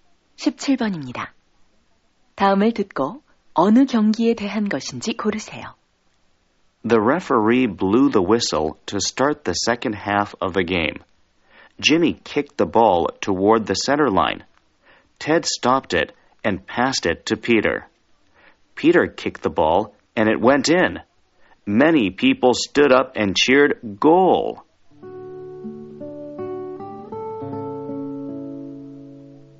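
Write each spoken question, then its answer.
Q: 다음을 듣고 어느 경기에 대한 것인지 고르세요.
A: 축구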